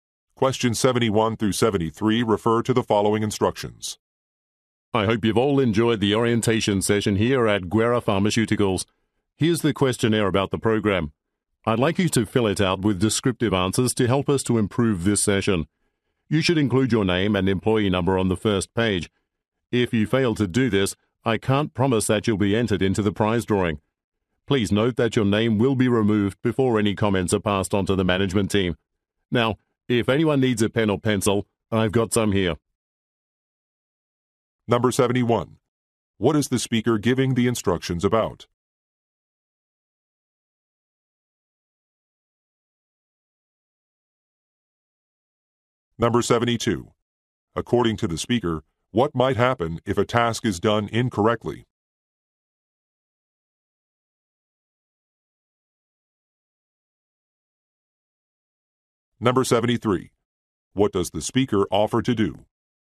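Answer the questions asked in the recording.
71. Filling out a questionnaire about the orientation session
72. They might not be entered into the prize drawing
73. Provide a pen or pencil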